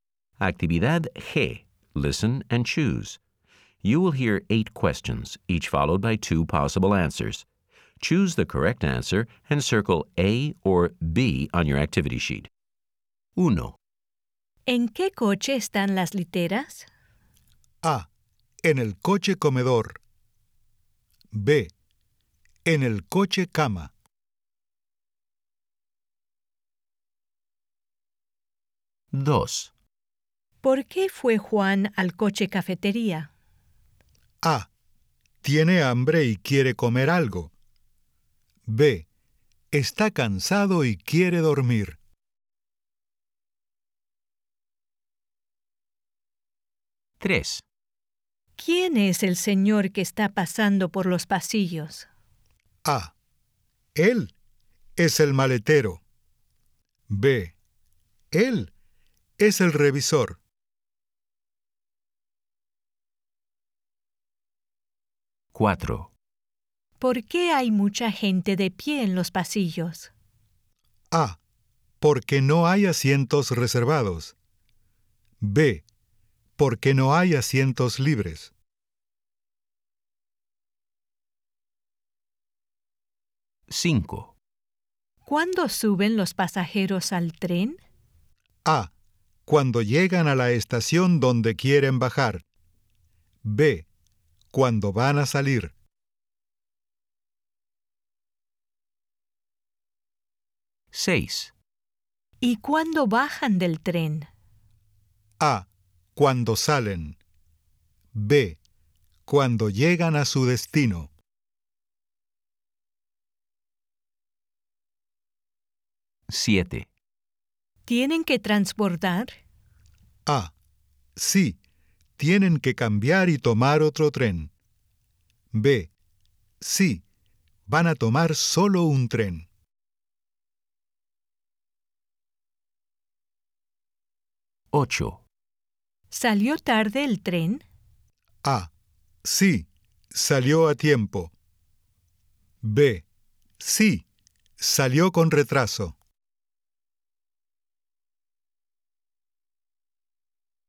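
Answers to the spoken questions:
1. B: En el coche cama.
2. A: Tiene hambre y quiere comer algo.
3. B: Él es el revisor.
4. B: Porque no hay asientos libres.
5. B: Cuando van a salir.
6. B: Cuando llegan a su destino.
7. A: Sí, tienen que cambiar y tomar otro tren.
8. B: Sí, salió con retraso.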